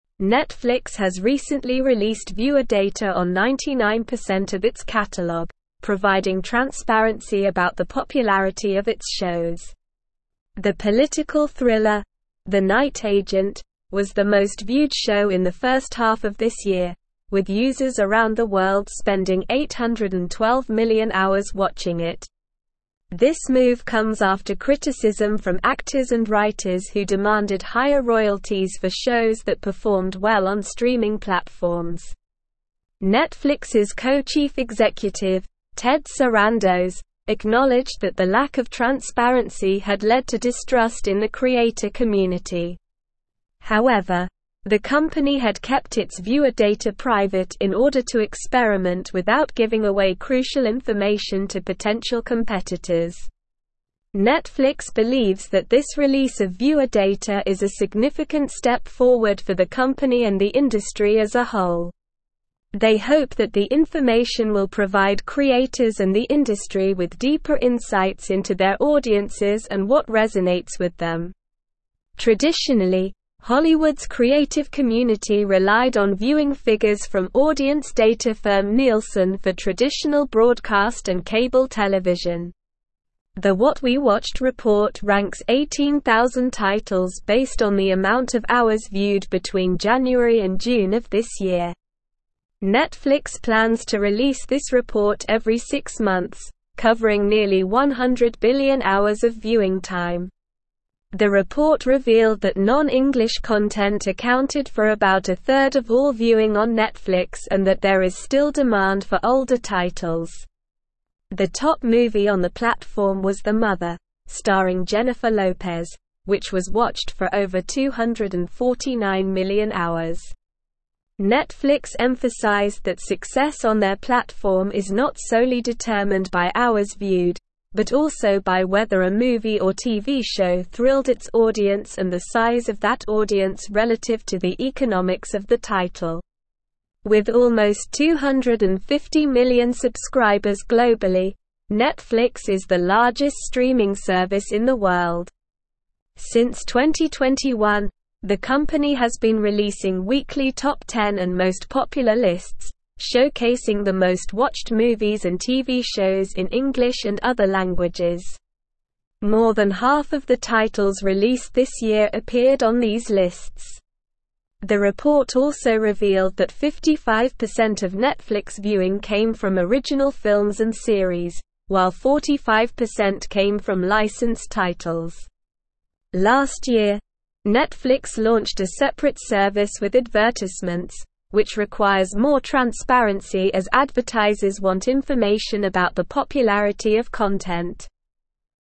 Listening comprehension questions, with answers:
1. Netflix has recently released viewer data on 99% of its catalogue, providing (1)______ about the popularity of its shows.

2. The political (2)______, The Night Agent, was the most viewed show in the first half of this year, with users around the world (3)______ 812 million hours (4)______ it.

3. The political (2)______, The Night Agent, was the most viewed show in the first half of this year, with users around the world (3)______ 812 million hours (4)______ it.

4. The political (2)______, The Night Agent, was the most viewed show in the first half of this year, with users around the world (3)______ 812 million hours (4)______ it.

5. However, the company had kept its viewer data private in order to experiment without giving away crucial information to (5)______ competitors.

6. (6)______ believes that this release of viewer data is a significant step forward for the company and the industry as a whole.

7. Traditionally, Hollywood's creative community relied on viewing figures from audience data firm (7)______ for traditional broadcast and cable television.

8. The What We Watched report ranks 18,000 titles based on the amount of hours viewed between (8)______ and June of this year.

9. The report revealed that non-English content accounted for about a (9)______ of all viewing on Netflix and that there is still demand for older (10)______.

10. The report revealed that non-English content accounted for about a (9)______ of all viewing on Netflix and that there is still demand for older (10)______.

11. The top movie on the platform was The Mother, (11)______ Jennifer Lopez, which was watched for over 249 million hours.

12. Netflix emphasized that success on their platform is not solely determined by hours viewed, but also by whether a movie or TV show thrilled its audience and the size of that audience (12)______ to the economics of the title.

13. Since 2021, the (13)______ has been releasing weekly Top 10 and Most Popular lists, showcasing the most-watched movies and TV shows in English and other languages.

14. The (14)______ also revealed that 55% of Netflix (15)______ came from original films and series, while 45% came from licensed titles.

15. The (14)______ also revealed that 55% of Netflix (15)______ came from original films and series, while 45% came from licensed titles.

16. Last year, Netflix launched a separate service with advertisements, which requires more transparency as (16)______ want information about the popularity of content.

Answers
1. transparency
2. thriller
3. spending
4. watching
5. potential
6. Netflix
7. Nielsen
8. January
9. third
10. titles
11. starring
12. relative
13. company
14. report
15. viewing
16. advertisers

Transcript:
Netflix has released viewer data on 99% of its catalogue for the first time, revealing that users around the world spent 812 million hours watching the political thriller The Night Agent, making it the most viewed show in the first half of this year.
The political thriller, The Night Agent, was the most viewed show in the first half of this year, with users around the world spending 812 million hours watching it. This move comes after criticism from actors and writers who demanded higher royalties for shows that performed well on streaming platforms. Netflix's co-chief executive, Ted Sarandos, acknowledged that the lack of transparency had led to distrust in the creator community. However, the company had kept its viewer data private in order to experiment without giving away crucial information to potential competitors.
Netflix believes that this release of viewer data is a significant step forward for the company and the industry as a whole. They hope that the information will provide creators and the industry with deeper insights into their audiences and what resonates with them. Traditionally, Hollywood's creative community relied on viewing figures from audience data firm Nielsen for traditional broadcast and cable television. The What We Watched report ranks 18,000 titles based on the amount of hours viewed between January and June of this year. Netflix plans to release this report every six months, covering nearly 100 billion hours of viewing time.
The report revealed that non-English content accounted for about a third of all viewing on Netflix and that there is still demand for older titles. The top movie on the platform was The Mother, starring Jennifer Lopez, which was watched for over 249 million hours. Netflix emphasized that success on their platform is not solely determined by hours viewed, but also by whether a movie or TV show thrilled its audience and the size of that audience relative to the economics of the title.
With almost 250 million subscribers globally, Netflix is the largest streaming service in the world. Since 2021, the company has been releasing weekly Top 10 and Most Popular lists, showcasing the most-watched movies and TV shows in English and other languages. More than half of the titles released this year appeared on these lists. The report also revealed that 55% of Netflix viewing came from original films and series, while 45% came from licensed titles. Last year, Netflix launched a separate service with advertisements, which requires more transparency as advertisers want information about the popularity of content.

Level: Level 4